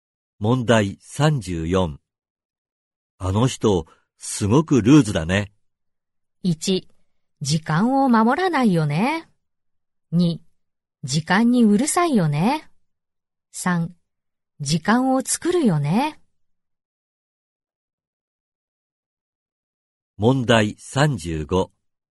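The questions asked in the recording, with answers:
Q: あの人、すごくルーズだね。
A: 1: 時間を守らないよね。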